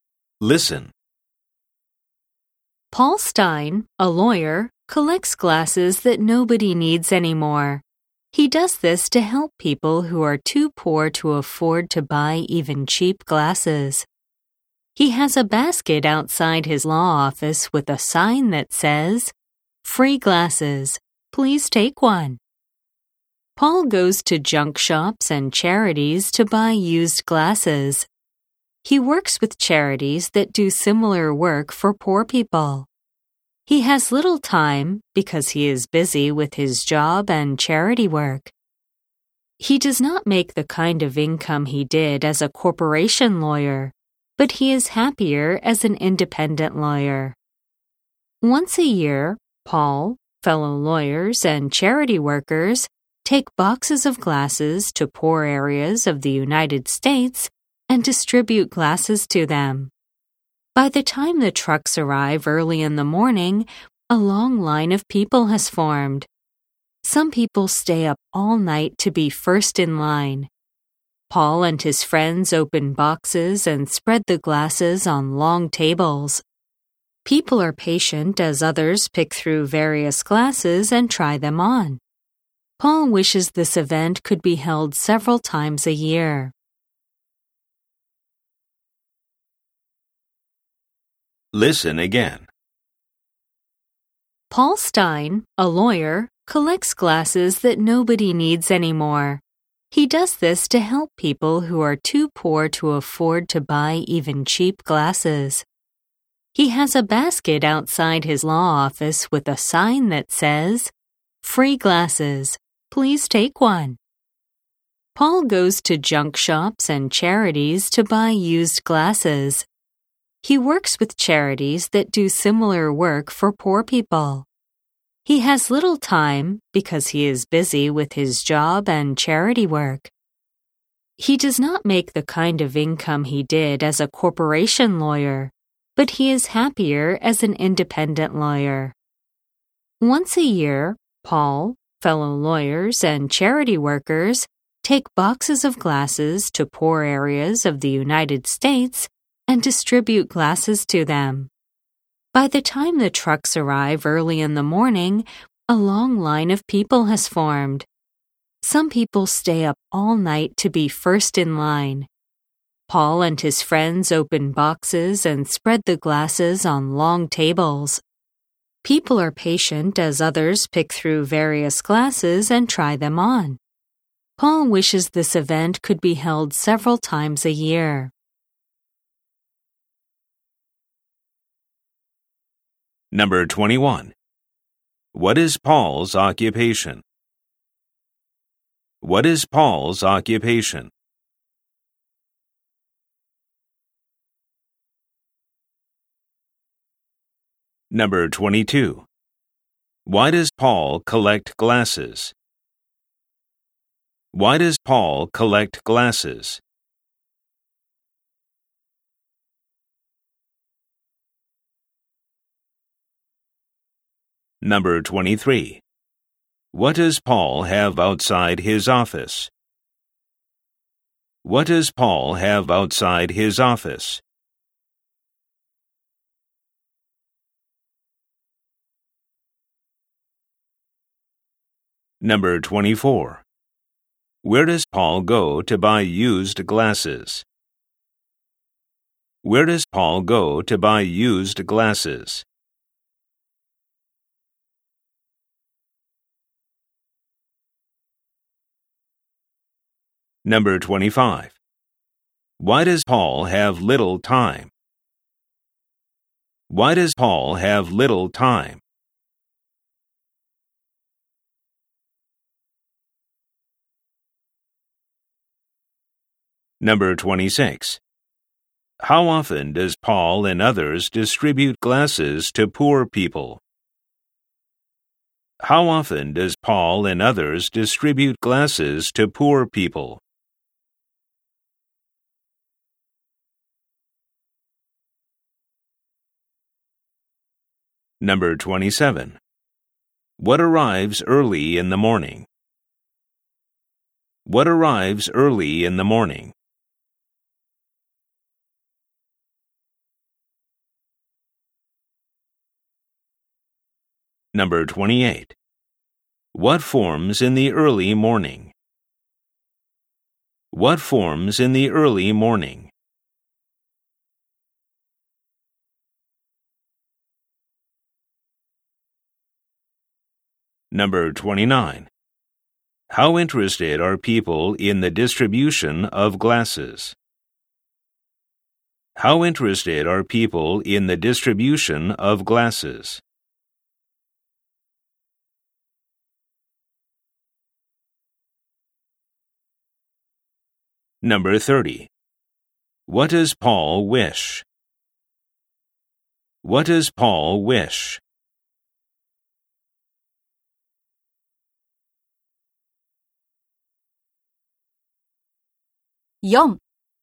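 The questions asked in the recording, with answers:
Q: What is Paul's occupation?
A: He is a lawyer.

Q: Why does Paul collect glasses?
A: To help people too poor to buy even cheap glasses.

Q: What does Paul have outside his office?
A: A basket with a sign that says "Free glasses."

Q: Where does Paul go to buy used glasses?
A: To junk shops and charities.

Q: Why does Paul have little time?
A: He is busy with his job and charity work.

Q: How often does Paul and others distribute glasses to poor people?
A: Once a year.

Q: What arrives early in the morning?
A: The trucks.

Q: What forms in the early morning?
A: A long line of people.

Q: What does Paul wish?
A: That the event could be held several times a year.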